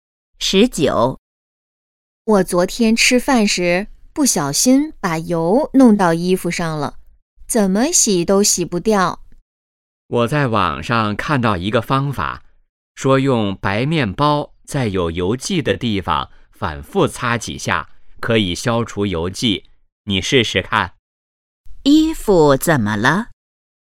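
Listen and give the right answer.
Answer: 沾上了油迹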